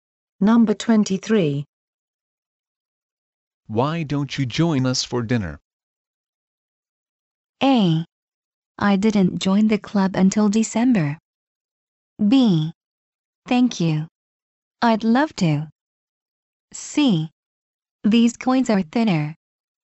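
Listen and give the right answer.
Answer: B: Thank you. I'd love to.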